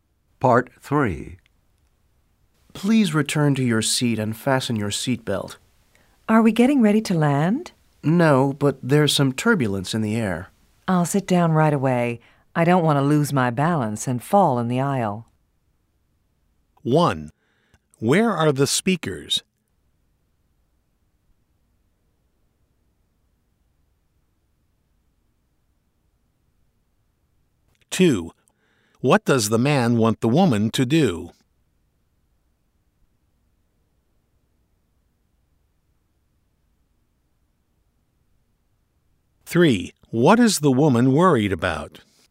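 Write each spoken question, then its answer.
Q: Where are the speakers?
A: On an airplane

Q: What is the woman worried about?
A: Losing her balance and falling in the aisle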